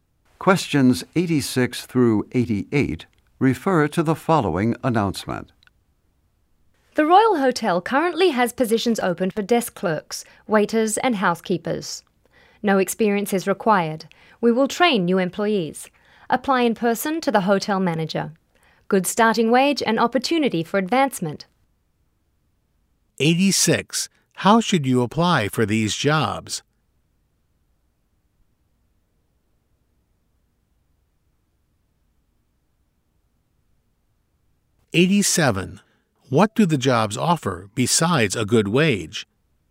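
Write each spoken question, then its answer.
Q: How should you apply for these jobs?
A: In person to the hotel manager

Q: What do the jobs offer besides a good wage?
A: Opportunity for advancement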